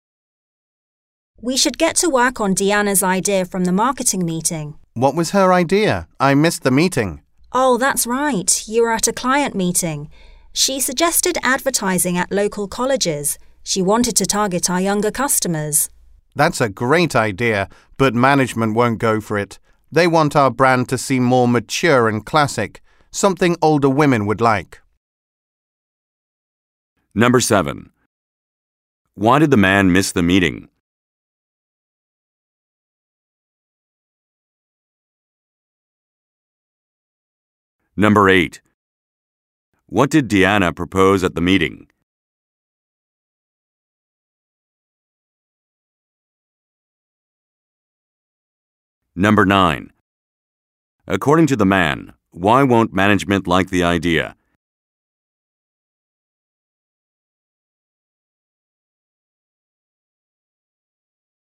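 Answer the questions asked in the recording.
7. He was at a client meeting.
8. Advertising at local colleges to target younger customers.
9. They want the brand to seem more mature and classic, appealing to older women.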